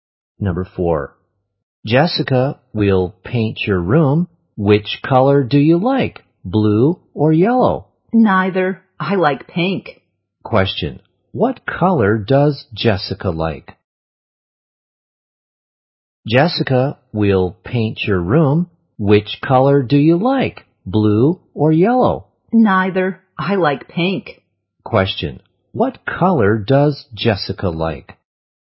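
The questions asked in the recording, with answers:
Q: What color does Jessica like?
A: Pink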